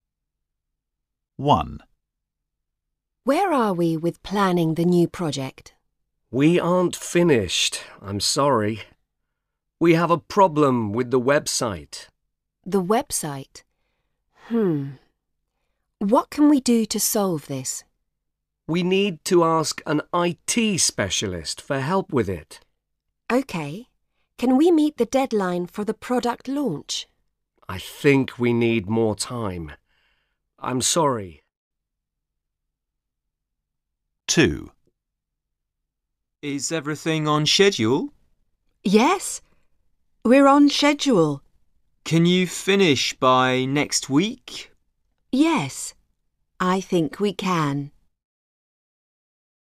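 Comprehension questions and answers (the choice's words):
Task 1: Listen and complete the conversations with the phrases in the box.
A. time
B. yes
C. we can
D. IT Specialist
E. new project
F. a problem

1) Where are we with planning the (1) ?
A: new project

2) We aren't finished, I'm sorry. We have (2) with the website.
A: a problem

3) We need to ask an (3) for help with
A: IT Specialist

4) I think we need more (4) I'm sorry.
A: time

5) (5) , we're on schedule.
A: yes

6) Yes, I think (6)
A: we can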